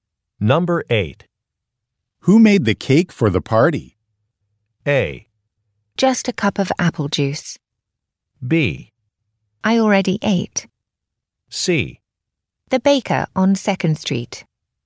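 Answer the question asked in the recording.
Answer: C: The baker on 2nd Street.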